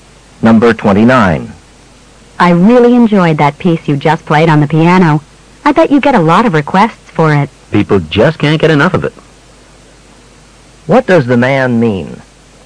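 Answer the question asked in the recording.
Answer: The piece is very popular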